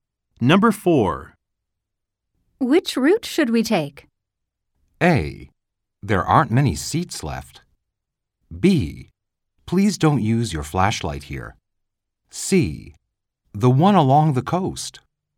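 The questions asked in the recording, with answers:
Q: Which route should we take?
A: C: The one along the coast.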